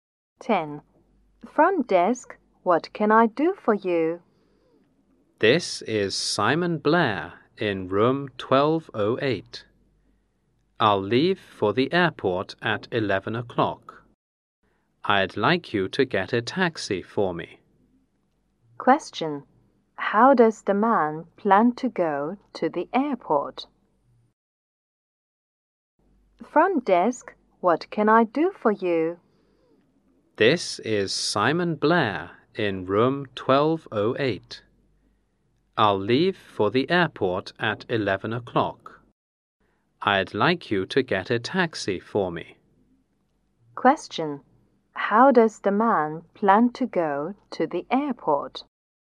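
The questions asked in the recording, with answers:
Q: How does the man plan to go to the airport?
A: By taxi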